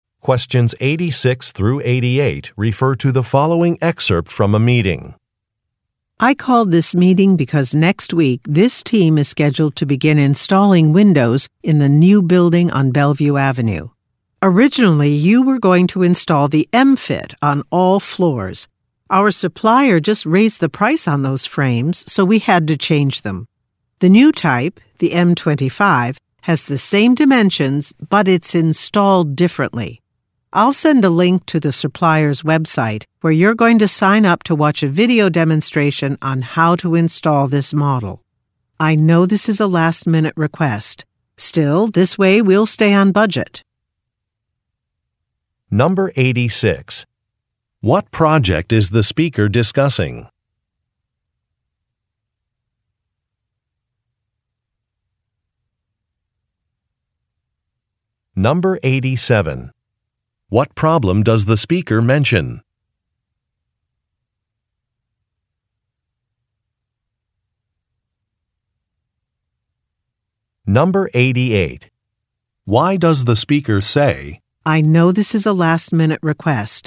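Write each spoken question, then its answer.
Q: What project is the speaker discussing?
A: Installing windows in a new building on Bellevue Avenue

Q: What problem does the speaker mention?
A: The supplier raised the price of the window frames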